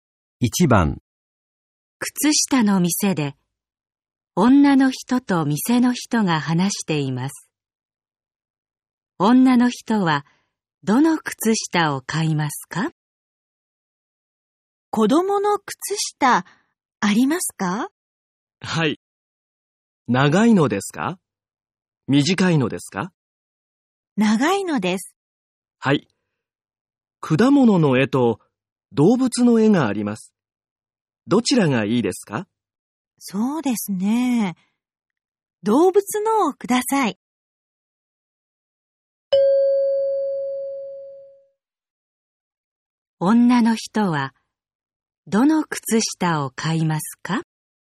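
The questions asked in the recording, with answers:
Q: 女の人は、どの靴下を買いますか?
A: 動物の絵の長い子供の靴下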